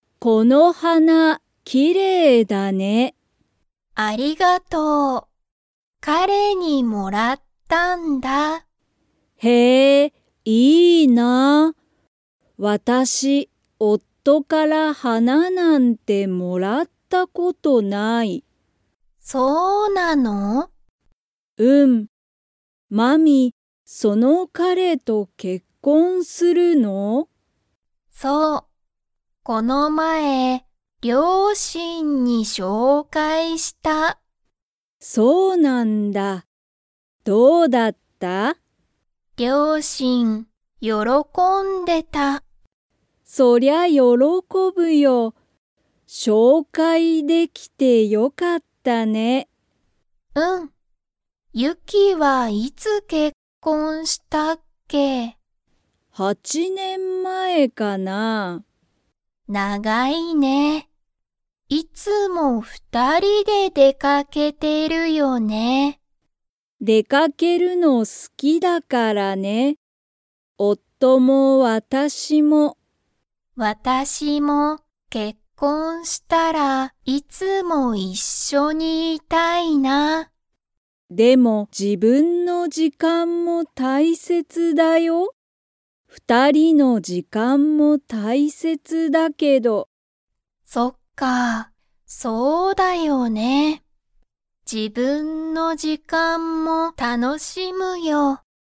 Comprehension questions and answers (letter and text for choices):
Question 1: まみは誰だれから花はなをもらいましたか?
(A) 両親りょうしん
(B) 彼かれ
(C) ゆき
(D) お母かあさん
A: (B) 彼かれ

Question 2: ゆきと夫おっとは出でかけるのが 。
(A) 好すきだ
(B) 好すきじゃない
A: (A) 好すきだ

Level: Level 3